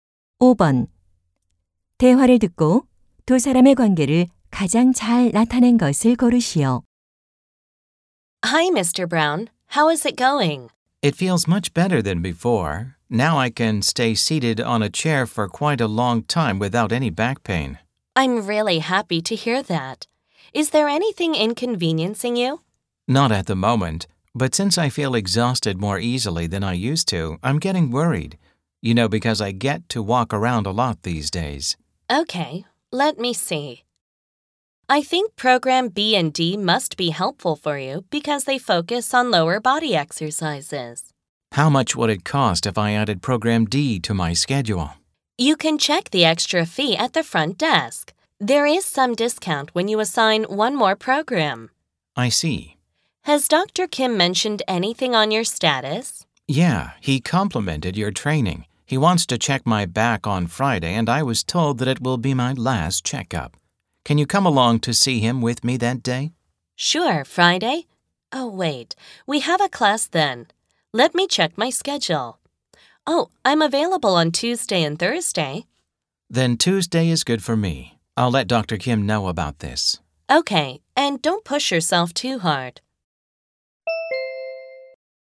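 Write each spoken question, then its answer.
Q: 대화를 듣고 두 사람의 관계를 가장 잘 나타낸 것을 고르시오.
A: 재활 트레이너 - 환자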